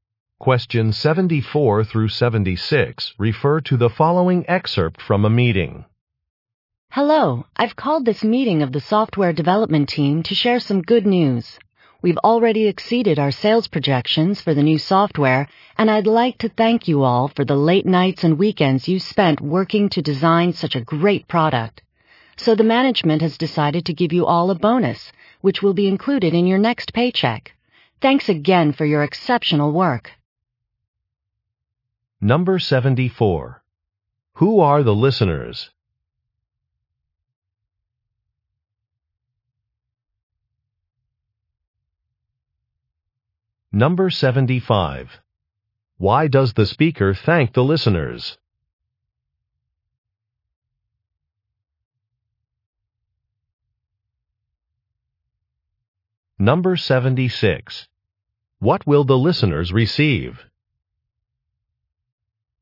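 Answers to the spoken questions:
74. Software developers
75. For their hard work designing the new software, which exceeded sales projections
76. A bonus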